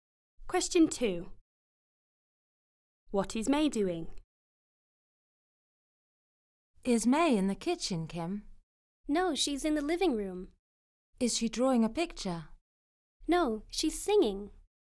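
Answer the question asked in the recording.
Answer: Singing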